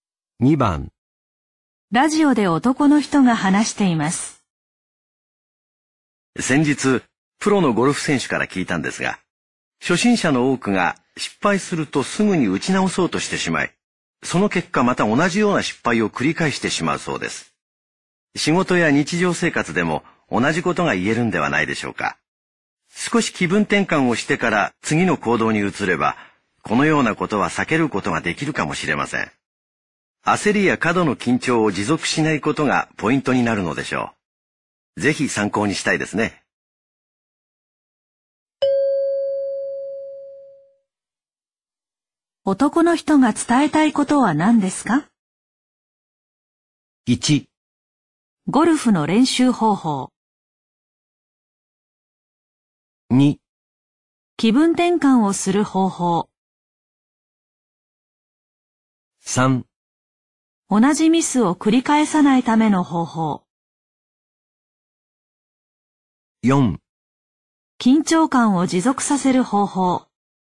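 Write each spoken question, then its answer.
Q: 男の人が伝えたいことは何ですか?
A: 3: 同じミスを繰り返さないための方法。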